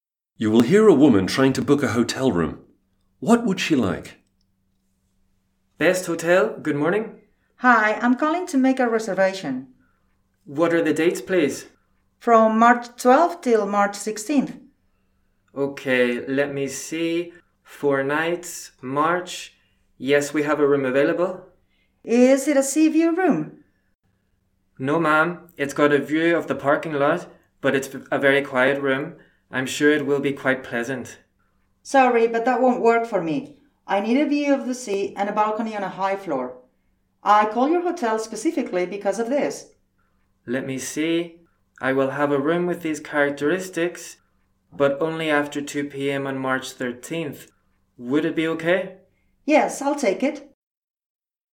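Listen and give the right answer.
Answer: A sea view room with a balcony on a high floor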